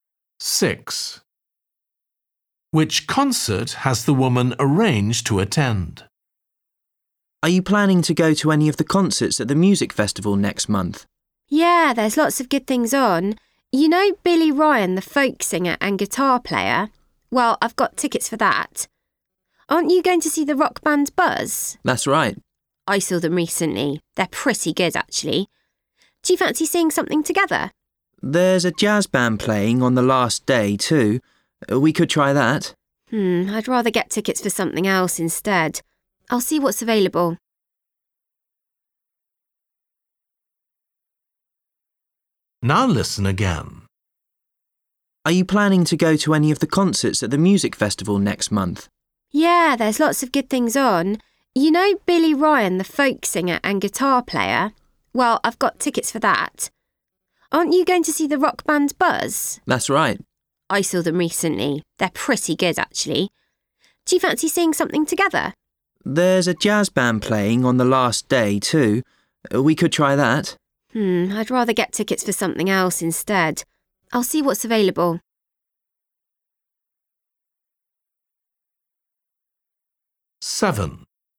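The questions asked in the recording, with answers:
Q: Which concert has the woman arranged to attend?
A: Billy Ryan, the folk singer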